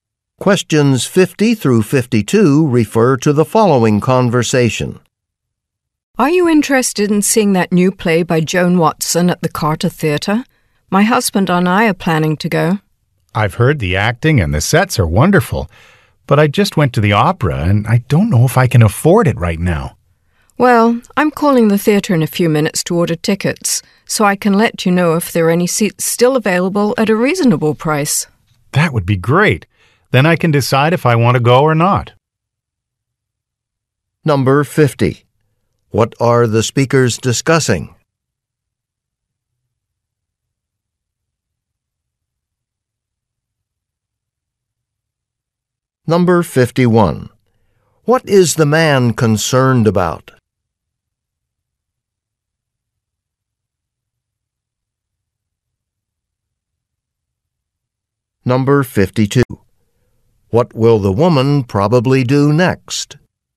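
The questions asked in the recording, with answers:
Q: What are the speakers discussing?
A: Going to see a new play at the Carter Theatre

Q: What is the man concerned about?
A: Whether he can afford the tickets

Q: What will the woman probably do next?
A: Call the theatre to order tickets and check prices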